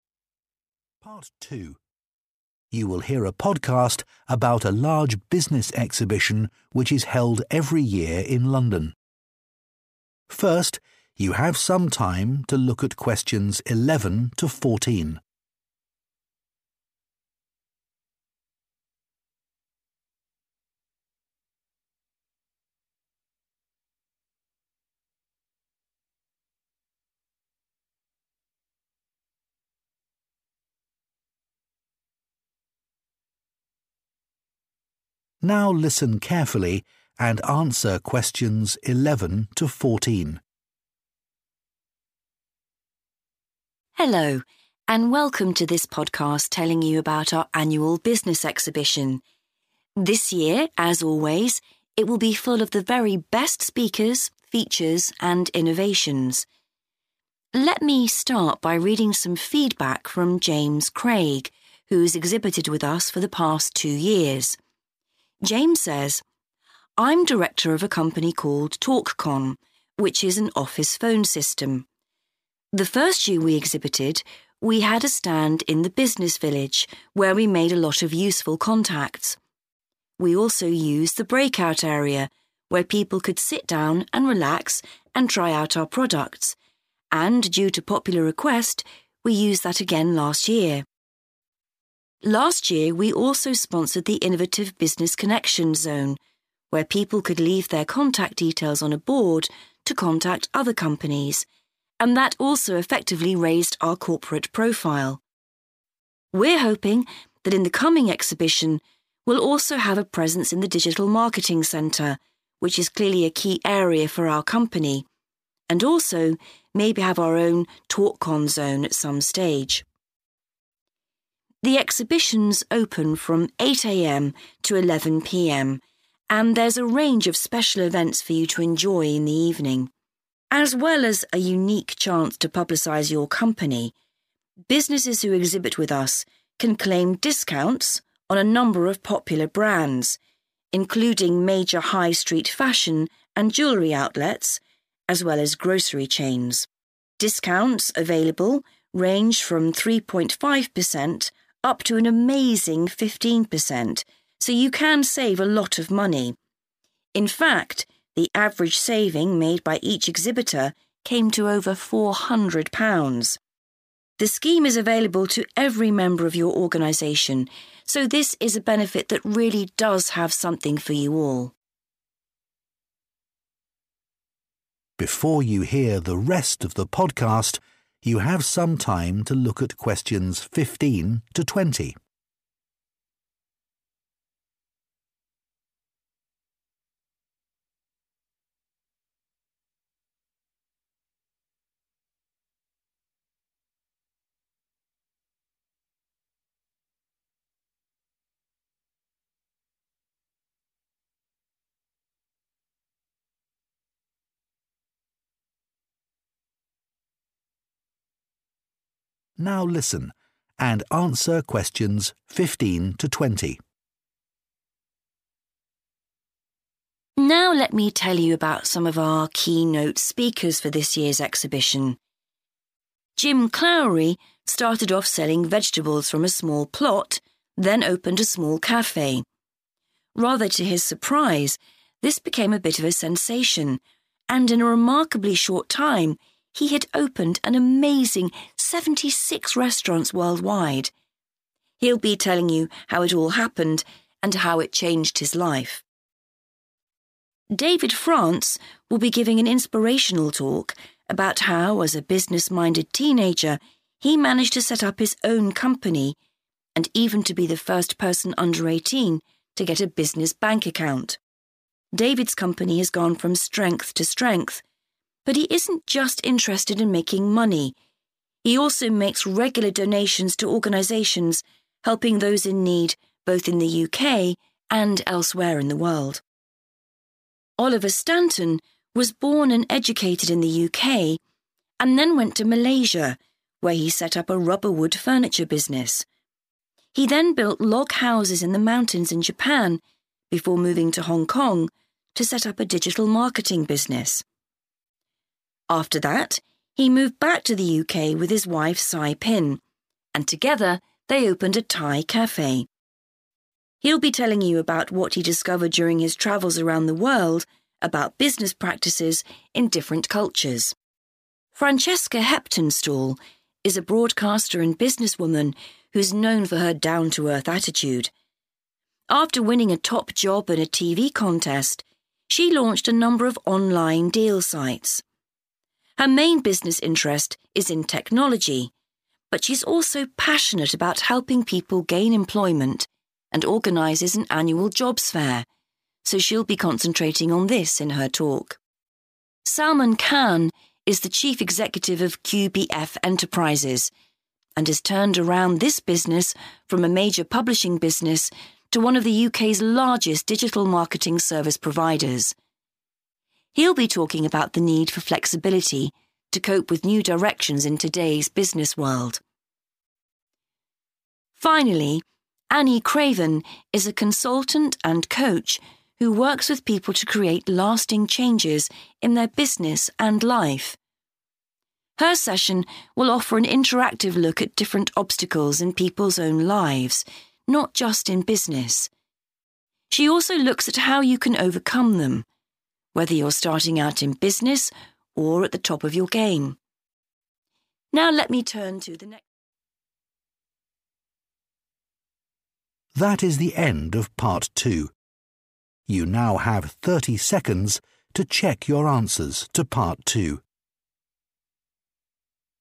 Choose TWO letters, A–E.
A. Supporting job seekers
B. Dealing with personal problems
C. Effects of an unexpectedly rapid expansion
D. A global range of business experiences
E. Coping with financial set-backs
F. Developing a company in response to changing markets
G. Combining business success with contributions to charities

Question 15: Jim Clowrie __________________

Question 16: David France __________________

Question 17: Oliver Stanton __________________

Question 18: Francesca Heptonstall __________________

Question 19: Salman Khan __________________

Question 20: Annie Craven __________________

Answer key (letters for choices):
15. C
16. G
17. D
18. A
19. F
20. B

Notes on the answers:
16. Bài nghe đề cập việc "công ty của David ngày càng phát triển mạnh mẽ" biểu thị cho business success. "Contributions to charities-những đóng góp từ thiện" được thể hiện qua thông tin "anh ấy cũng thường xuyên quyên góp cho các tổ chức giúp đỡ những người có hoàn cảnh khó khăn, cả ở Vương quốc Anh và những nơi khác trên thế giới."
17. Một loạt các hoạt động kinh doanh của Oliver (thành lập một doanh nghiệp sản xuất đồ nội thất bằng gỗ cao su, xây dựng các ngôi nhà gỗ trên núi, lập một doanh nghiệp tiếp thị kỹ thuật số, mở một quán cà phê Thái Lan) tại các quốc gia (Malaysia, Japan, Hong Kong hay UK) được đề cập nhằm làm rõ "a global range" trước khi chốt lại đây là "những gì mình đã khám phá được trong suốt các chuyến đi khắp thế giới về các phương thức kinh doanh ở những nền văn hóa khác nhau.", liên quan đến "business experiences"
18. Bài nghe có nhắc đến "Mối quan tâm kinh doanh chính của cô là trong lĩnh vực công nghệ, nhưng cô cũng rất tâm huyết với việc giúp đỡ mọi người tìm kiếm việc làm và tổ chức một hội chợ việc làm thường niên, vì vậy cô sẽ tập trung sâu vào chủ đề này trong bài phát biểu của mình." Chủ đề này là việc hỗ trợ mọi người tìm việc đã đề cập trước đó. Trong nội dung này ta cần lưu ý từ 'but', nên nếu chỉ tập trung vào nội dung trước "but" thì sẽ rất dễ bị hoảng vì không tìm được đáp án
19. Thông tin chứa đáp án được nhắc đến trong bài nghe qua cụm từ "turned around this business from...to..." – nghĩa là vực dậy doanh nghiệp này từ một công ty xuất bản lớn thành một trong những nhà cung cấp dịch vụ tiếp thị kỹ thuật số lớn nhất Vương quốc Anh. Câu hỏi có đề cập việc "thích ứng với cái gì-in response to" qua cụm từ "flexibility to cope with" và "new directions in today's business world" cũng được diễn đạt khác đi, mặc dù vẫn là "changing markets"
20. "Những vấn đề cá nhân – personal problems" được nhắc đến trong bài nghe qua cụm "different obstacles in people's own lives-những trở ngại trong cuộc sống của mỗi người". Và "cô cũng sẽ xem xét cách bạn có thể vượt qua chúng" nghĩa là làm sao để deal with những vấn đề đó. Các thông tin này hoàn toàn trùng khớp đáp án

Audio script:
Hello, and welcome to this podcast telling you about our annual business exhibition. This year, as always, it will be full of the very best speakers, features, and innovations.
Let me start by reading some feedback from James Craig, who's exhibited with us for the past two years. James says:
"I'm director of a company called TalkCon, which is an office phone system. The first year we exhibited, we had a stand in the Business Village, where we made a lot of useful contacts. We also used the breakout area where people could sit down and relax and try out our products. And due to popular request, we used that again last year.
Last year, we also sponsored the Innovative Business Connection Zone, where people could leave their contact details on a board to contact other companies, and that also effectively raised our corporate profile.
We're hoping that in the coming exhibition, we'll also have a presence in the Digital Marketing Center, which is clearly a key area for our company, and also, maybe have our own TalkCon zone at some stage."
The exhibition's open from 8:00 AM to 11:00 PM, and there's a range of special events for you to enjoy in the evening. As well as a unique chance to publicize your company, businesses who exhibit with us can claim discounts on a number of popular brands, including major high street fashion and jewelry outlets, as well as grocery chains. Discounts available range from 3.5% up to an amazing 15%, so you can save a lot of money.
In fact, the average saving made by each exhibitor came to over £400. The scheme is available to every member of your organization, so this is a benefit that really does have something for you all.
Before you hear the rest of the podcast, you have some time to look at questions 15 to 20. (Pause) Now listen and answer questions 15 to 20.
Host: Now let me tell you about some of our keynote speakers for this year's exhibition.
Jim Clowry started off selling vegetables from a small plot, then opened a small cafe. Rather to his surprise, this became a bit of a sensation, and in a remarkably short time, he had opened an amazing 76 restaurants worldwide. He'll be telling you how it all happened and how it changed his life.
David France will be giving an inspirational talk about how, as a business-minded teenager, he managed to set up his own company, and even to be the first person under 18 to get a business bank account. David's company has gone from strength to strength, but he isn't just interested in making money. He also makes regular donations to organizations helping those in need, both in the UK and elsewhere in the world.
Oliver Stanton was born and educated in the UK, and then went to Malaysia, where he set up a rubber wood furniture business. He then built log houses in the mountains in Japan, before moving to Hong Kong to set up a digital marketing business. After that, he moved back to the UK with his wife, Sai Pin, and together they opened a Thai cafe. He'll be telling you about what he discovered during his travels around the world about business practices in different cultures.
Francesca Heptonstall is a broadcaster and businesswoman who's known for her down-to-earth attitude. After winning a top job in a TV contest, she launched a number of online deal sites. Her main business interest is in technology, but she's also passionate about helping people gain employment, and organizes an annual jobs fair. So, she'll be concentrating on this in her talk.
Salman Khan is the chief executive of QBF Enterprises, and has turned around this business from a major publishing business to one of the UK's largest digital marketing service providers. He'll be talking about the need for flexibility to cope with new directions in today's business world.
Finally, Annie Craven is a consultant and coach who works with people to create lasting changes in their business and life. Her session will offer an interactive look at different obstacles in people's own lives, not just in business. She also looks at how you can overcome them, whether you're starting out in business or at the top of your game.
Now let me turn to the next...
That is the end of part 2. You now have 30 seconds to check your answers to part 2.